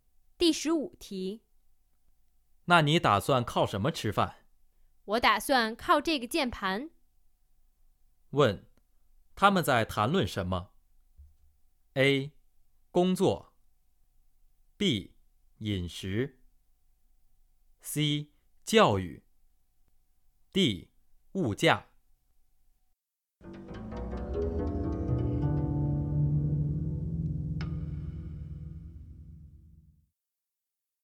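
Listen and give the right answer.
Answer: A: 工作。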